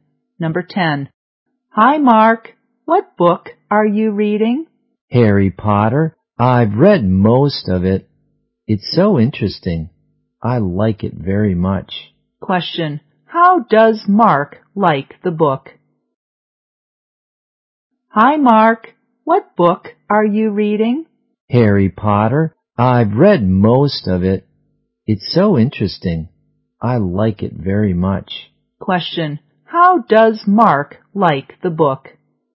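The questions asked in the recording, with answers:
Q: Question. How does Mark like the book?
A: He likes it very much; it's very interesting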